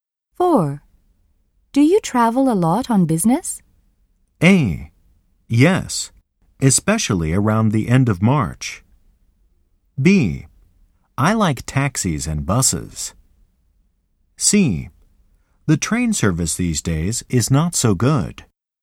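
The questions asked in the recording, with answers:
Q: Do you travel a lot on business?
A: A: Yes, especially around the end of March.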